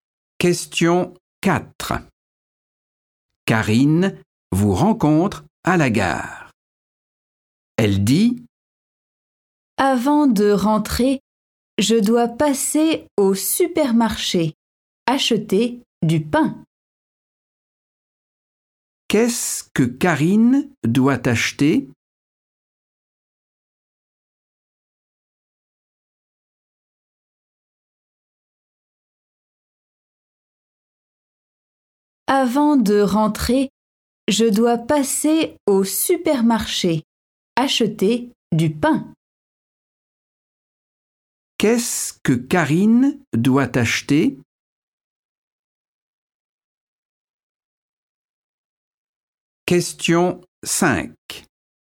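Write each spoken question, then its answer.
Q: Qu'est-ce que Karine doit acheter?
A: du pain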